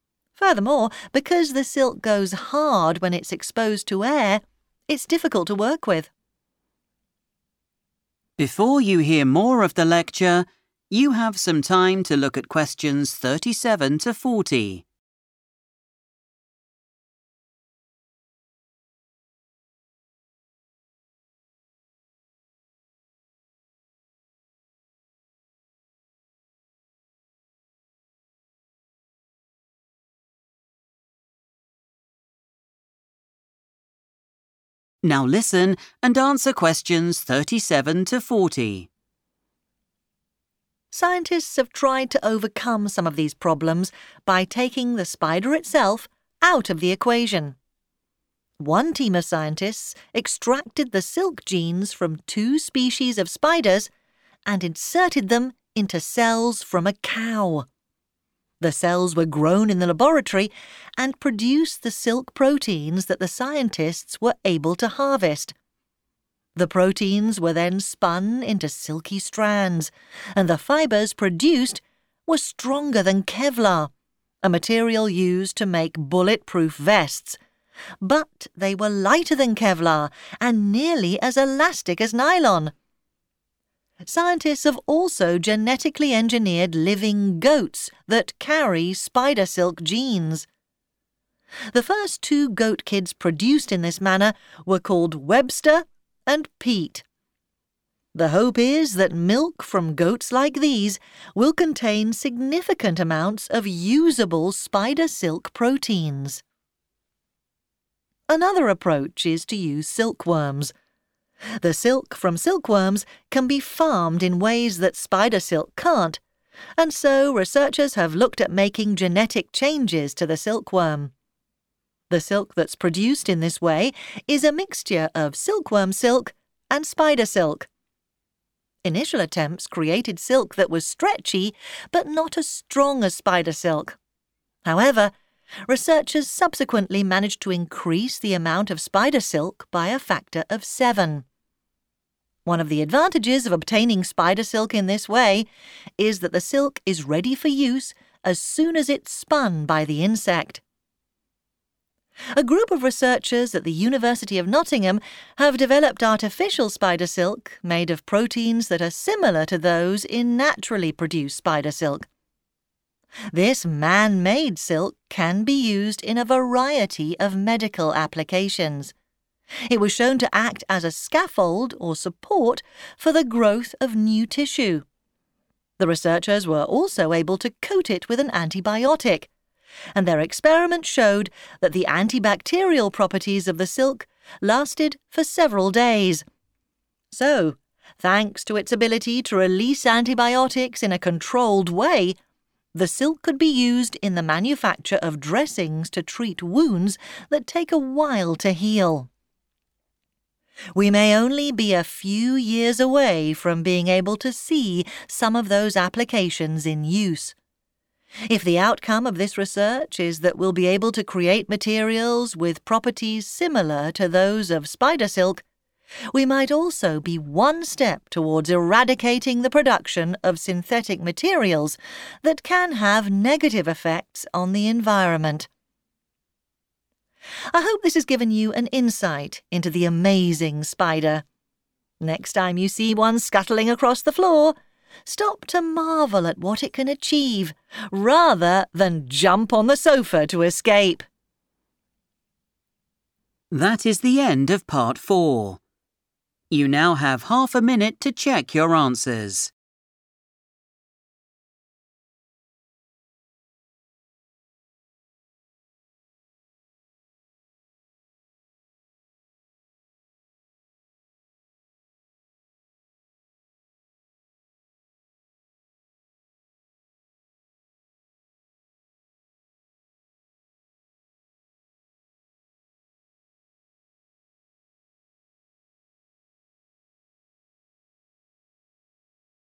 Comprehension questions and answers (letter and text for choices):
Choose your answers from the box and write the correct letter, A-D.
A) cows' cells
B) goats' milk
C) silkworms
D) synthetic silk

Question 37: It could be used to help wounds heal.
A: D) synthetic silk

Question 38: It is stronger than a particular man-made material.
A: A) cows' cells

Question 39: It requires no further work after the silk is spun.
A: C) silkworms

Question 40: It could produce large quantities of silk protein.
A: B) goats' milk

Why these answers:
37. The correct answer is D because the transcript discusses a type of 'artificial' or 'man-made' silk developed by scientists at the University of Nottingham. This silk is designed for medical use because it can act as a frame for new tissue to grow on and can be covered in medicine to fight germs. These features make it suitable for creating bandages (dressings) to help injuries (wounds) get better, especially those that take a long time to heal.
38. The correct answer is identified by looking at the part of the text that describes silk made from cow cells. The text says that the silk fibers created from this specific process were stronger than Kevlar. Kevlar is a well-known man-made material used for safety equipment like bulletproof vests.
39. The correct answer is C because the lecturer explains that when silk is produced using genetically modified silkworms, it is ready to be used the moment the insect creates it. This means there are no extra steps or processing needed once the silk is spun, unlike the methods involving cow cells or goat milk where proteins must be harvested and spun separately.
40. The correct answer is B because the speaker mentions that scientists have changed the genes of goats so they can make spider silk. The goal is for the milk from these goats to have enough protein to make lots of silk. In the text, the phrase 'significant amounts' is used, which means the same thing as 'large quantities' in the question.

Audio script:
However, there's one significant problem. It isn't possible to obtain the amount of silk needed for applications like these from spiders. It would take ages to collect the material from their natural habitat, and farming spiders isn't possible as they are aggressive, territorial creatures who will attack and eat each other. Furthermore, because the silk goes hard when it's exposed to air, it's difficult to work with.
Scientists have tried to overcome some of these problems by taking the spider itself out of the equation. One team of scientists extracted the silk genes from two species of spiders and inserted them into cells from a cow. The cells were grown in the laboratory and produced the silk proteins that the scientists were able to harvest. The proteins were then spun into silky strands and the fibres produced were stronger than Kevlar, a material used to make bulletproof vests, but they were lighter than Kevlar and nearly as elastic as nylon. Scientists have also genetically engineered living goats that carry spider silk genes. The first two goat kids produced in this manner were called Webster and Pete. The hope is that milk from goats like these will contain significant amounts of usable spider silk proteins.
Another approach is to use silkworms. The silk from silkworms can be farmed in ways that spider silk can't and so researchers have looked at making genetic changes to the silkworm. The silk that's produced in this way is a mixture of silkworm silk and spider silk. Initial attempts created silk that was stretchy but not as strong as spider silk. However, researchers subsequently managed to increase the amount of spider silk by a factor of seven. One of the advantages of obtaining spider silk in this way is that the silk is ready for use as soon as it's spun by the insect.
A group of researchers at the University of Nottingham have developed artificial spider silk made of proteins that are similar to those in naturally produced spider silk. This man-made silk can be used in a variety of medical applications. It was shown to act as a scaffold or support for the growth of new tissue. The researchers were also able to coat it with an antibiotic, and their experiments showed that the antibacterial properties of the silk lasted for several days. So, thanks to its ability to release antibiotics in a controlled way, the silk could be used in the manufacture of dressings to treat wounds that take a while to heal.
We may only be a few years away from being able to see some of those applications in use. If the outcome of this research is that we'll be able to create materials with properties similar to those of spider silk, we might also be one step towards eradicating the production of synthetic materials that can have negative effects on the environment.
I hope this has given you an insight into the amazing spider. Next time you see one scuttling across the floor, stop to marvel at what it can achieve rather than jump on the sofa to escape.